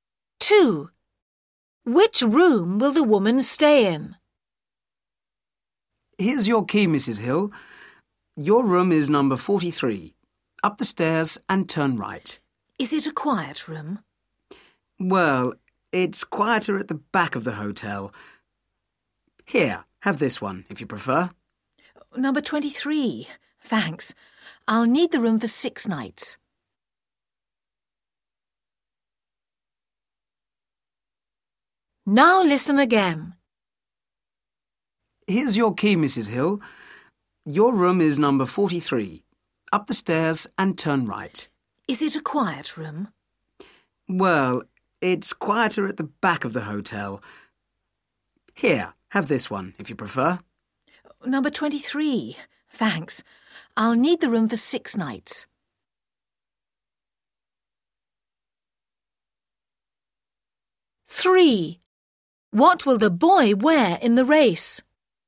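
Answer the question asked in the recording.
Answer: number 23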